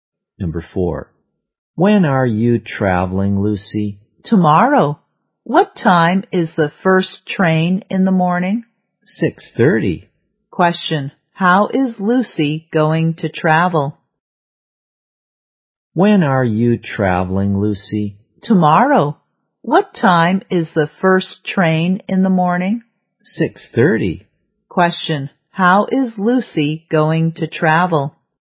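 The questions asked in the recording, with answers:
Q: how is Lucy going to travel?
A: By train.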